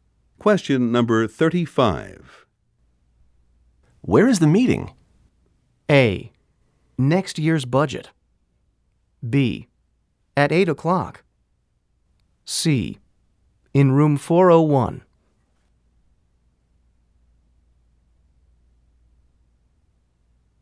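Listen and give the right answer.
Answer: C: In room 401.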